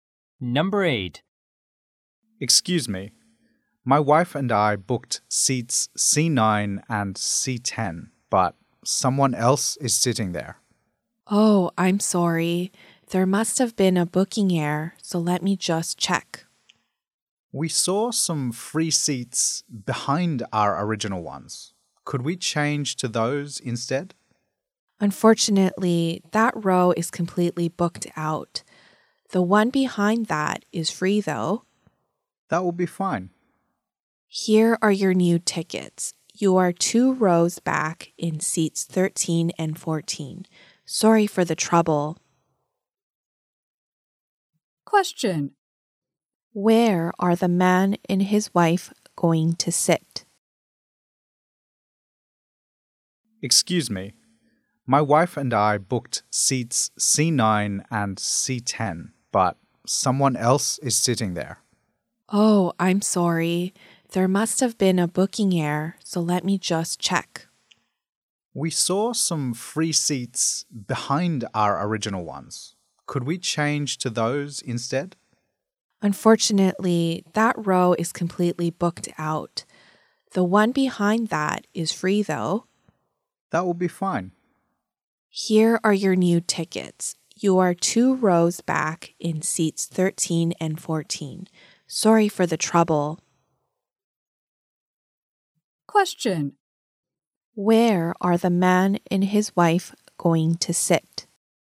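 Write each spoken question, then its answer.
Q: Where are the man and his wife going to sit?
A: Two rows back, in seats 13 and 14.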